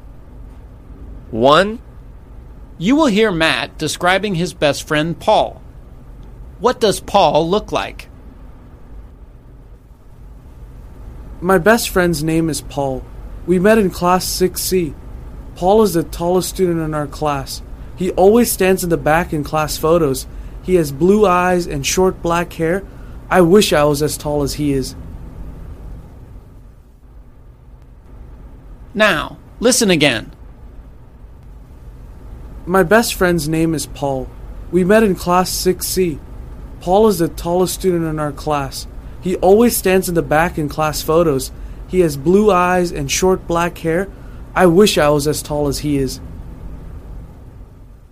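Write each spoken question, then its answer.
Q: What does Paul look like?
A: He is very tall, with blue eyes and short black hair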